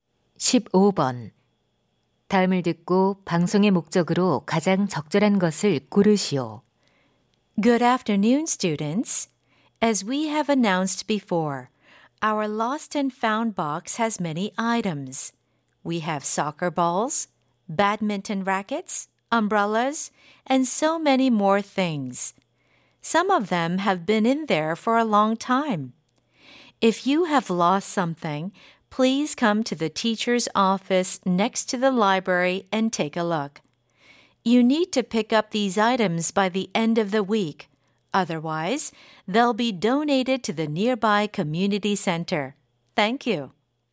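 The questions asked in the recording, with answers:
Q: 다음을 듣고 방송의 목적으로 가장 적절한 것을 고르시오.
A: 분실물을 찾아가도록 안내하려고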